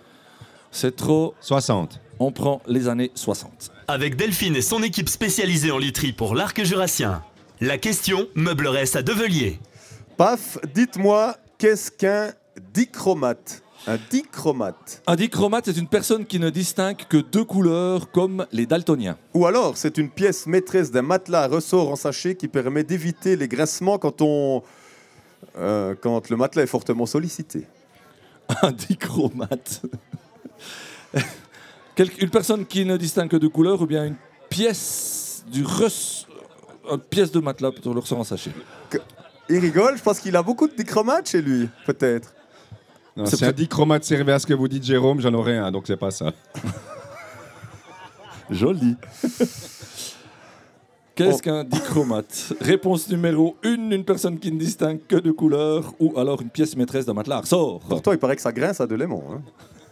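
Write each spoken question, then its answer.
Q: Paf, dites-moi, qu'est-ce qu'un dichromate ?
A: 1: une personne qui ne distingue que deux couleurs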